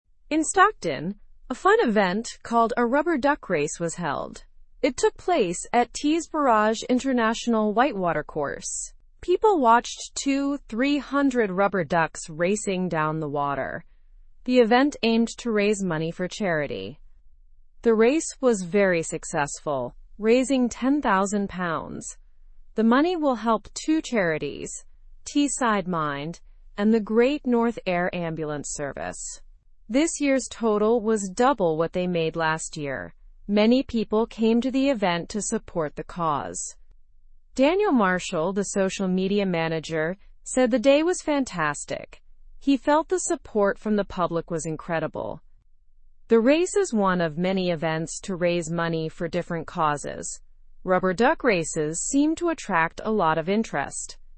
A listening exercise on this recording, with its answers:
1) What event was held in Stockton?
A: The event was a rubber duck race.

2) Where did the rubber duck race take place?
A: It took place at Tees Barrage International White Water Course.

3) How many rubber ducks were involved in the race?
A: There were 2,300 rubber ducks racing.

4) How much money was raised by the event?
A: The event raised £10,

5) Which charities will benefit from the money raised?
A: Teesside Mind and the Great North Air Ambulance Service will benefit.

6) What did Daniel Marshall say about the public's support?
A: Daniel Marshall said the public's support was incredible.

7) What is the purpose of the rubber duck race event?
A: The purpose is to raise money for charity.

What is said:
In Stockton, a fun event called a rubber duck race was held. It took place at Tees Barrage International White Water Course. People watched 2,300 rubber ducks racing down the water. The event aimed to raise money for charity.
The race was very successful, raising £10,000. The money will help two charities: Teesside Mind and the Great North Air Ambulance Service. This year's total was double what they made last year. Many people came to the event to support the cause.
Daniel Marshall, the social media manager, said the day was fantastic. He felt the support from the public was incredible. The race is one of many events to raise money for different causes. Rubber duck races seem to attract a lot of interest.

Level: Level 2